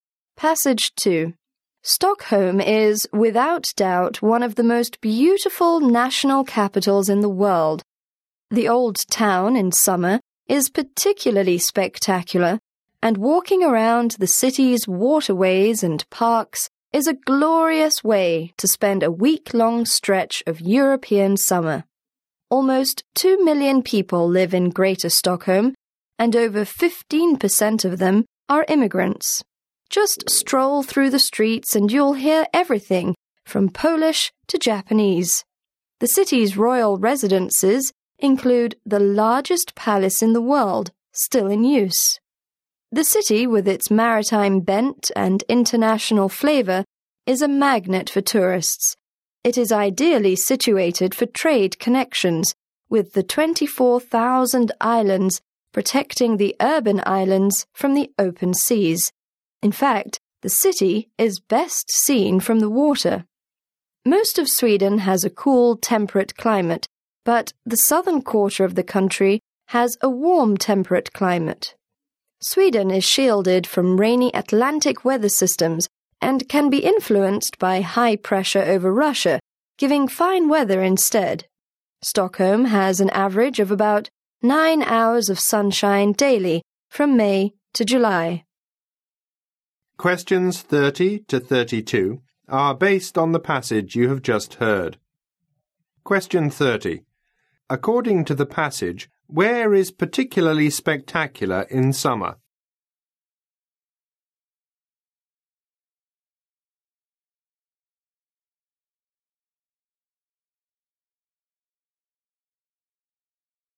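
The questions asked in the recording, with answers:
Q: According to the passage, where is particularly spectacular in summer?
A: The old town of Stockholm.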